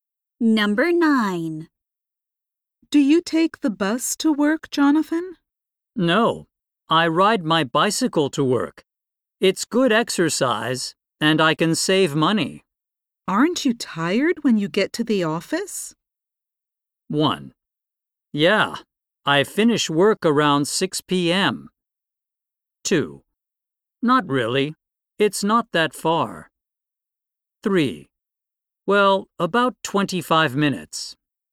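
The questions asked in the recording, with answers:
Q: Aren't you tired when you get to the office?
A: 2: Not really. It's not that far.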